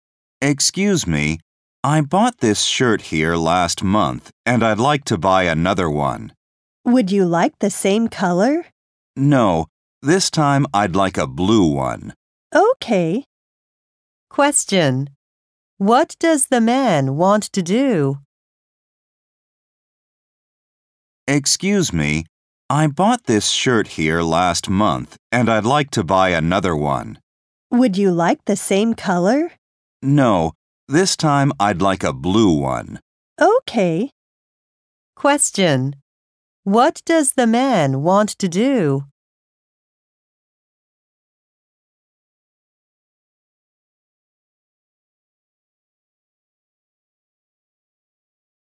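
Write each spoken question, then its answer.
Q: What does the man want to do?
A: Buy another shirt in blue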